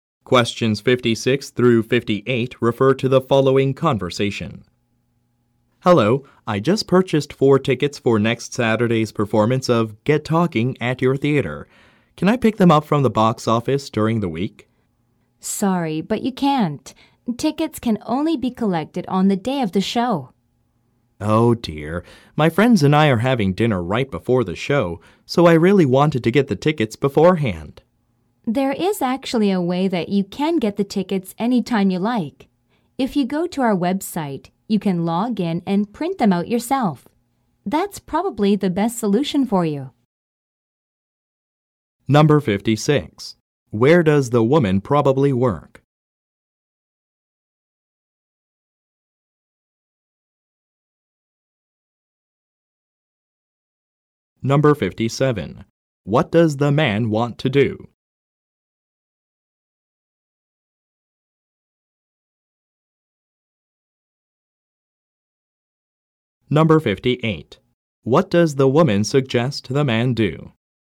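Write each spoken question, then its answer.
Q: Where does the woman probably work?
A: At a theater (box office)

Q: What does the man want to do?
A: Pick up his tickets before the day of the show

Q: What does the woman suggest the man do?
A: Print the tickets himself from the website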